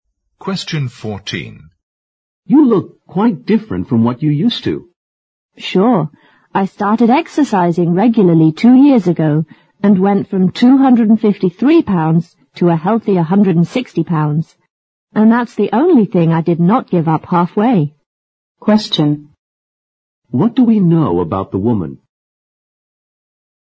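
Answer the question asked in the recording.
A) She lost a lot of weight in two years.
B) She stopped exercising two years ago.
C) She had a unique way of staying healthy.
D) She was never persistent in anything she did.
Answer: A) She lost a lot of weight in two years.

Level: 六级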